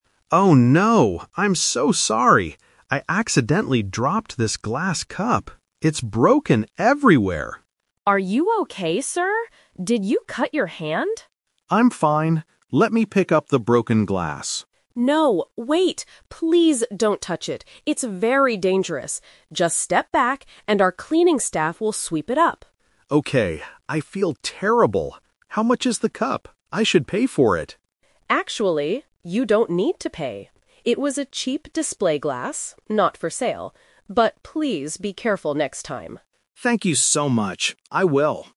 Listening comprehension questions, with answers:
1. What did the customer want to do first?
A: Pick up the broken glass.

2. Why does the manager tell the customer to step back?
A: Because touching the broken glass is dangerous.

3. How much will the customer pay for the broken cup?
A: Nothing.

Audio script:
Customer: Oh no! I'm so sorry! I accidentally dropped this glass cup. It's broken everywhere.
Manager: Are you okay, sir? Did you cut your hand?
Customer: I'm fine. Let me pick up the broken glass...
Manager: No, wait! Please don't touch it. It's very dangerous. Just step back, and our cleaning staff will sweep it up.
Customer: Okay. I feel terrible. How much is the cup? I should pay for it.
Manager: Actually, you don't need to pay. It was a cheap display glass, not for sale. But please be careful next time.